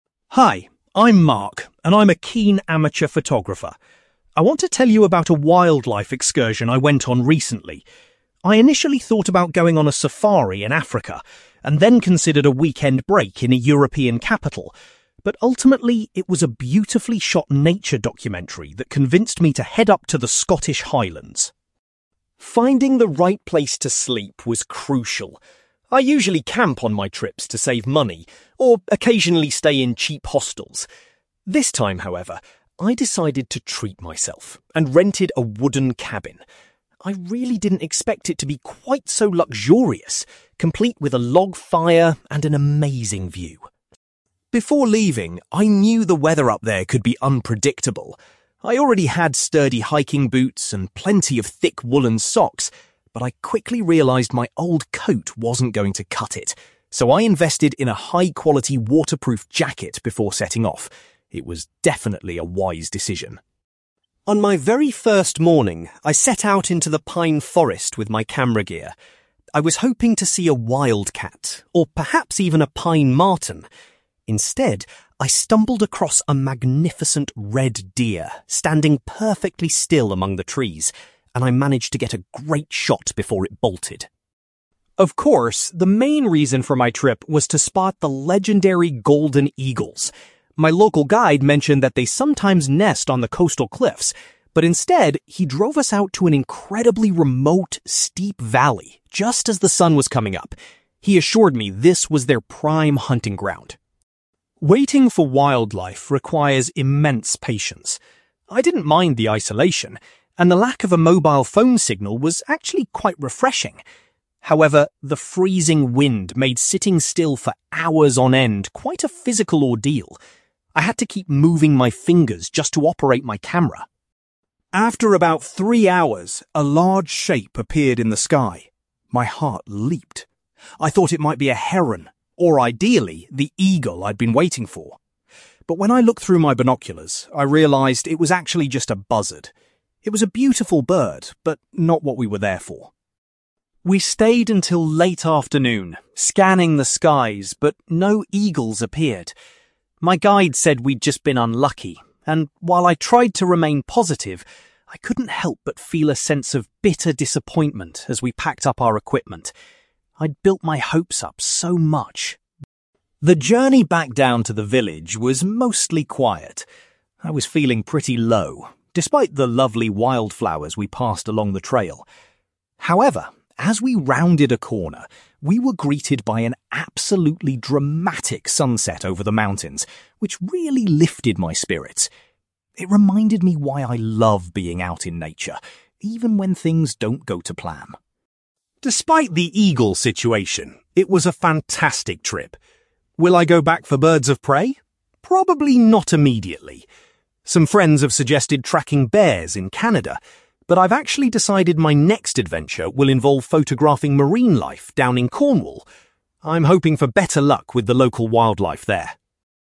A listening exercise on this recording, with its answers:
You will hear a man called Mark talking about a wildlife photography excursion to the Scottish Highlands. For questions 9-18, complete the sentences with a word or short phrase.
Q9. Mark decided to go to the Scottish Highlands after watching a (9)........................... on television.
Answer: nature documentary

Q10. Mark was surprised by how comfortable the (10)........................... he stayed in was.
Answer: wooden cabin

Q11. Mark realised he needed to purchase a new (11)........................... for the harsh weather.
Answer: waterproof jacket

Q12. On his first hike, Mark managed to get a photograph of a (12)........................... in the forest.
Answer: red deer

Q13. To find the eagles, Mark's guide took him to a (13)........................... early in the morning.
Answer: steep valley

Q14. Mark found the long wait challenging because of the (14)........................... .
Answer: freezing wind

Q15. Through his binoculars, Mark was excited to see a bird which turned out to be a (15)........................... .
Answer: buzzard

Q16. Mark uses the phrase (16)........................... to describe his reaction to missing the eagles.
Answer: bitter disappointment

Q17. The sight of a (17)........................... helped to improve Mark's mood on the way back.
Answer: dramatic sunset

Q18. Next year, Mark is planning to observe (18)........................... instead of birds.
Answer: marine life

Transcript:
Mark: Hi, I'm Mark, and I'm a keen amateur photographer. I want to tell you about a wildlife excursion I went on recently. I initially thought about going on a safari in Africa, and then considered a weekend break in a European capital, but ultimately, it was a beautifully shot nature documentary that convinced me to head up to the Scottish Highlands.
Finding the right place to sleep was crucial. I usually camp on my trips to save money, or occasionally stay in cheap hostels. This time, however, I decided to treat myself and rented a wooden cabin. I really didn't expect it to be quite so luxurious, complete with a log fire and an amazing view.
Before leaving, I knew the weather up there could be unpredictable. I already had sturdy hiking boots and plenty of thick woollen socks, but I quickly realised my old coat wasn't going to cut it, so I invested in a high-quality waterproof jacket before setting off. It was definitely a wise decision!
On my very first morning, I set out into the pine forest with my camera gear. I was hoping to see a wildcat, or perhaps even a pine marten. Instead, I stumbled across a magnificent red deer standing perfectly still among the trees, and I managed to get a great shot before it bolted.
Of course, the main reason for my trip was to spot the legendary golden eagles. My local guide mentioned that they sometimes nest on the coastal cliffs, but instead, he drove us out to an incredibly remote, steep valley just as the sun was coming up. He assured me this was their prime hunting ground.
Waiting for wildlife requires immense patience. I didn't mind the isolation, and the lack of a mobile phone signal was actually quite refreshing. However, the freezing wind made sitting still for hours on end quite a physical ordeal. I had to keep moving my fingers just to operate my camera.
After about three hours, a large shape appeared in the sky. My heart leaped. I thought it might be a heron, or ideally, the eagle I'd been waiting for. But when I looked through my binoculars, I realised it was actually just a buzzard. It was a beautiful bird, but not what we were there for.
We stayed until late afternoon, scanning the skies, but no eagles appeared. My guide said we'd just been unlucky, and while I tried to remain positive, I couldn't help but feel a sense of bitter disappointment as we packed up our equipment. I'd built my hopes up so much.
The journey back down to the village was mostly quiet. I was feeling pretty low, despite the lovely wild flowers we passed along the trail. However, as we rounded a corner, we were greeted by an absolutely dramatic sunset over the mountains, which really lifted my spirits. It reminded me why I love being out in nature, even when things don't go to plan.
Despite the eagle situation, it was a fantastic trip. Will I go back for birds of prey? Probably not immediately. Some friends have suggested tracking bears in Canada, but I've actually decided my next adventure will involve photographing marine life down in Cornwall. I'm hoping for better luck with the local wildlife there!

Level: B2